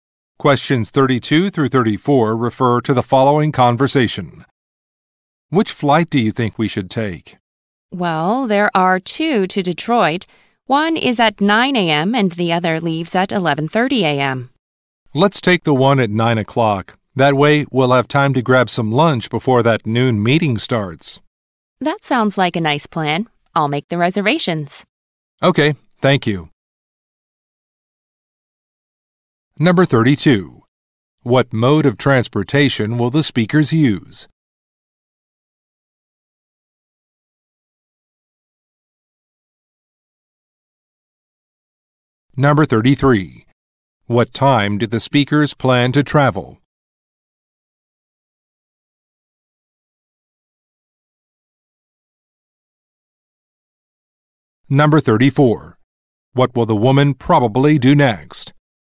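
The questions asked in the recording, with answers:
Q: What mode of transportation will the speakers use?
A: Airplane

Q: What time do the speakers plan to travel?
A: At 9 a.m.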